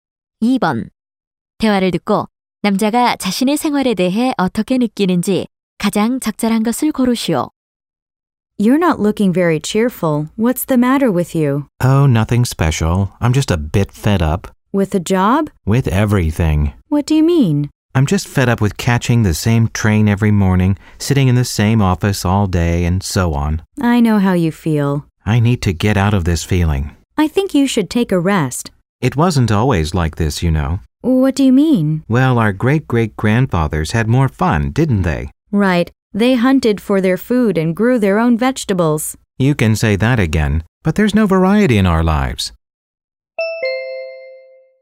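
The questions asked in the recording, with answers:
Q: 대화를 듣고 남자가 자신의 생활에 대해 어떻게 느끼는지 가장 적절한 것을 고르시오.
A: 지루하고 싫증이 난다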